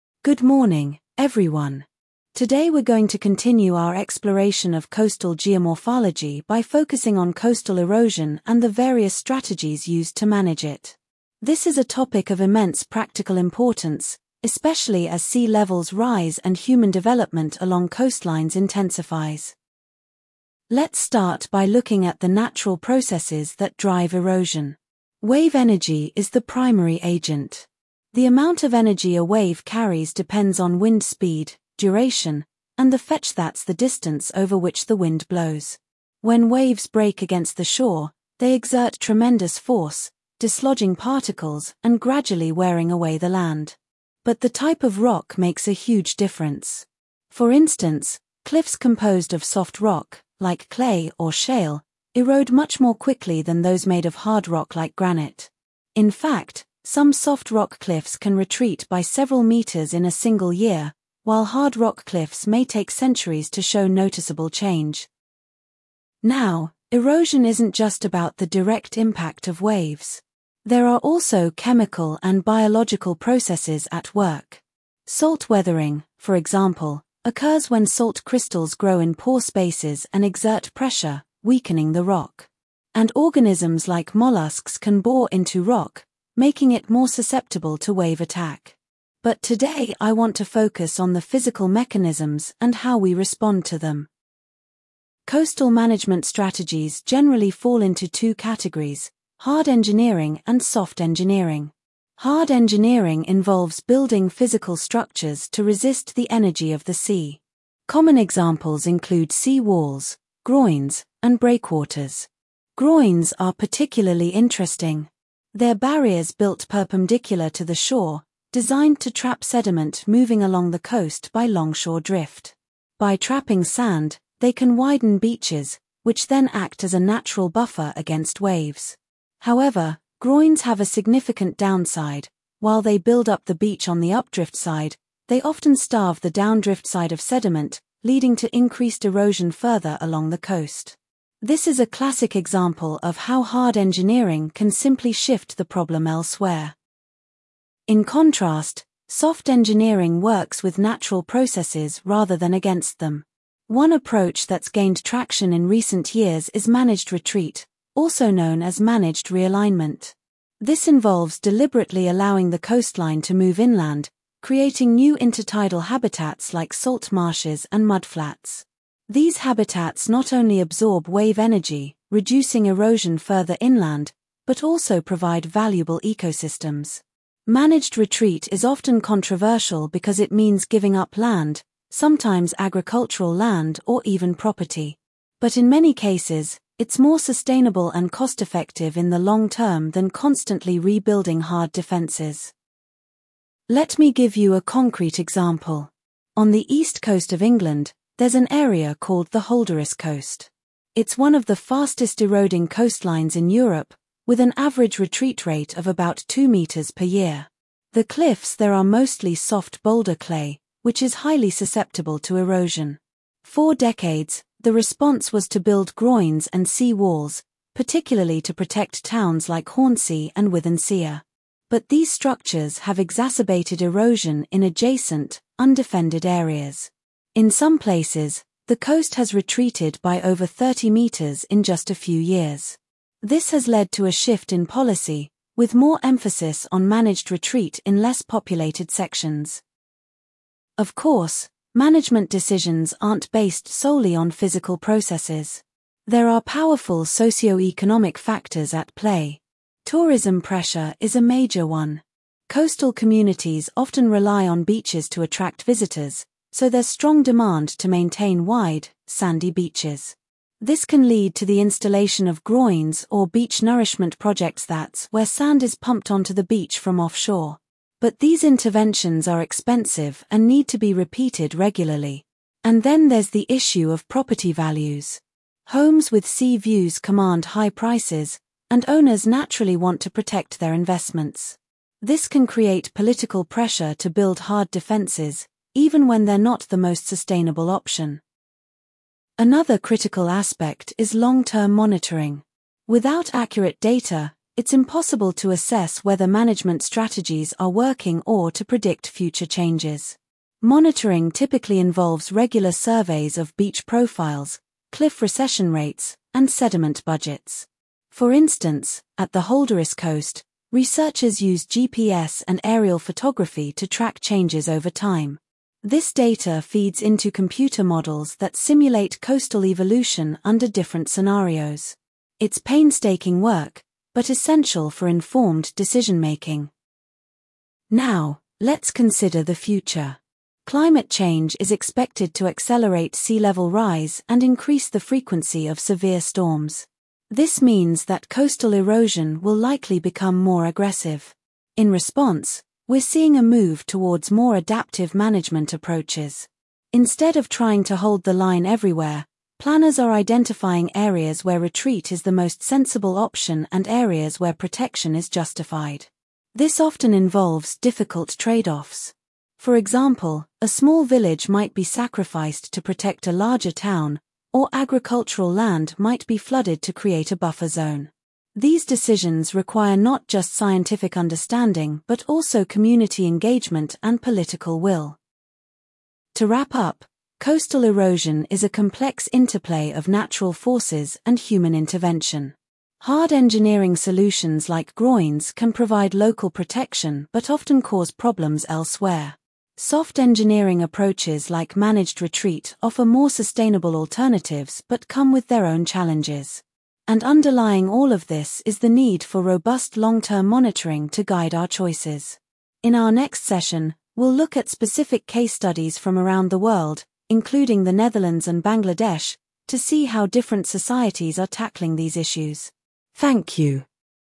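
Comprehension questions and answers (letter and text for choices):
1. Complete the note: The primary factor in coastal erosion is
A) salt weathering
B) wave energy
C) biological activity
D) wind speed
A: B) wave energy

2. Complete the note: Soft rock cliffs can retreat up to several ______ per year.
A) centimetres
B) metres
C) kilometres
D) millimetres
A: B) metres

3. According to the lecturer, what is a disadvantage of groynes?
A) They are expensive to build.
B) They increase erosion on the downdrift side.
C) They require frequent maintenance.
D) They destroy marine habitats.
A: B) They increase erosion on the downdrift side.

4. Complete the table: Managed retreat creates new intertidal habitats such as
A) sand dunes and shingle beaches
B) salt marshes and mudflats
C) coral reefs and seagrass beds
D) rocky shores and tide pools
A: B) salt marshes and mudflats

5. What is the average annual retreat rate of the Holderness Coast?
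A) About 30 metres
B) About 2 metres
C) About 10 metres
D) About 0.5 metres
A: B) About 2 metres

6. Why does the lecturer mention tourism pressure?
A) To explain why property values are high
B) To illustrate a socioeconomic factor influencing management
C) To describe a cause of erosion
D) To argue against hard engineering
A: B) To illustrate a socioeconomic factor influencing management

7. Complete the note: Long-term monitoring includes surveys of beach profiles, cliff recession rates, and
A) sediment budgets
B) wave heights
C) tourist numbers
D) property prices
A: A) sediment budgets

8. What does the lecturer suggest about future coastal management?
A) Hard engineering will become more common.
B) Managed retreat will be universally adopted.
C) Adaptive management will involve trade-offs.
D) Monitoring will be less important.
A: C) Adaptive management will involve trade-offs.

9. According to the lecturer, what is a key requirement for informed decision-making?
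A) Community engagement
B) Long-term monitoring data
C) Political will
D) International cooperation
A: B) Long-term monitoring data

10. What will the next lecture focus on?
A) The geology of the Holderness Coast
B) Case studies from the Netherlands and Bangladesh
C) Methods of beach nourishment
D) The impact of climate change on erosion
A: B) Case studies from the Netherlands and Bangladesh

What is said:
Good morning, everyone. Today we're going to continue our exploration of coastal geomorphology by focusing on coastal erosion and the various strategies used to manage it. This is a topic of immense practical importance, especially as sea levels rise and human development along coastlines intensifies.
Let's start by looking at the natural processes that drive erosion. Wave energy is the primary agent. The amount of energy a wave carries depends on wind speed, duration, and the fetch-that's the distance over which the wind blows. 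When waves break against the shore, they exert tremendous force, dislodging particles and gradually wearing away the land. But the type of rock makes a huge difference. For instance, cliffs composed of soft rock, like clay or shale, erode much more quickly than those made of hard rock like granite. In fact, some soft rock cliffs can retreat by several metres in a single year, while hard rock cliffs may take centuries to show noticeable change.
Now, erosion isn't just about the direct impact of waves. There are also chemical and biological processes at work. Salt weathering, for example, occurs when salt crystals grow in pore spaces and exert pressure, weakening the rock. And organisms like molluscs can bore into rock, making it more susceptible to wave attack. But today I want to focus on the physical mechanisms and how we respond to them.
Coastal management strategies generally fall into two categories: hard engineering and soft engineering. 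Hard engineering involves building physical structures to resist the energy of the sea. Common examples include sea walls, groynes, and breakwaters. Groynes are particularly interesting. They're barriers built perpendicular to the shore, designed to trap sediment moving along the coast by longshore drift. By trapping sand, they can widen beaches, which then act as a natural buffer against waves. However, groynes have a significant downside: while they build up the beach on the updrift side, they often starve the downdrift side of sediment, leading to increased erosion further along the coast. This is a classic example of how hard engineering can simply shift the problem elsewhere.
In contrast, soft engineering works with natural processes rather than against them. One approach that's gained traction in recent years is managed retreat, also known as managed realignment. This involves deliberately allowing the coastline to move inland, creating new intertidal habitats like salt marshes and mudflats. 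These habitats not only absorb wave energy, reducing erosion further inland, but also provide valuable ecosystems. Managed retreat is often controversial because it means giving up land, sometimes agricultural land or even property. But in many cases, it's more sustainable and cost-effective in the long term than constantly rebuilding hard defences.
Let me give you a concrete example. On the east coast of England, there's an area called the Holderness Coast. It's one of the fastest-eroding coastlines in Europe, with an average retreat rate of about two metres per year. The cliffs there are mostly soft boulder clay, which is highly susceptible to erosion. For decades, the response was to build groynes and sea walls, particularly to protect towns like Hornsea and Withernsea. But these structures have exacerbated erosion in adjacent, undefended areas. In some places, the coast has retreated by over 30 metres in just a few years. 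This has led to a shift in policy, with more emphasis on managed retreat in less populated sections.
Of course, management decisions aren't based solely on physical processes. There are powerful socioeconomic factors at play. Tourism pressure is a major one. Coastal communities often rely on beaches to attract visitors, so there's strong demand to maintain wide, sandy beaches. This can lead to the installation of groynes or beach nourishment projects-that's where sand is pumped onto the beach from offshore. But these interventions are expensive and need to be repeated regularly. And then there's the issue of property values. Homes with sea views command high prices, and owners naturally want to protect their investments. This can create political pressure to build hard defences, even when they're not the most sustainable option.
Another critical aspect is long-term monitoring. Without accurate data, it's impossible to assess whether management strategies are working or to predict future changes. 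Monitoring typically involves regular surveys of beach profiles, cliff recession rates, and sediment budgets. For instance, at the Holderness Coast, researchers use GPS and aerial photography to track changes over time. This data feeds into computer models that simulate coastal evolution under different scenarios. It's painstaking work, but essential for informed decision-making.
Now, let's consider the future. Climate change is expected to accelerate sea-level rise and increase the frequency of severe storms. This means that coastal erosion will likely become more aggressive. In response, we're seeing a move towards more adaptive management approaches. Instead of trying to hold the line everywhere, planners are identifying areas where retreat is the most sensible option and areas where protection is justified. This often involves difficult trade-offs. For example, a small village might be sacrificed to protect a larger town, or agricultural land might be flooded to create a buffer zone. 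These decisions require not just scientific understanding but also community engagement and political will.
To wrap up, coastal erosion is a complex interplay of natural forces and human intervention. Hard engineering solutions like groynes can provide local protection but often cause problems elsewhere. Soft engineering approaches like managed retreat offer more sustainable alternatives but come with their own challenges. And underlying all of this is the need for robust long-term monitoring to guide our choices. In our next session, we'll look at specific case studies from around the world, including the Netherlands and Bangladesh, to see how different societies are tackling these issues. Thank you.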